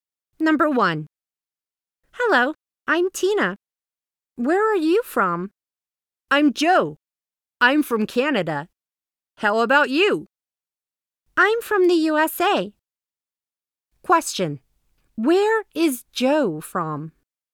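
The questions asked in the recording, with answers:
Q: Where is Joe from?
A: Canada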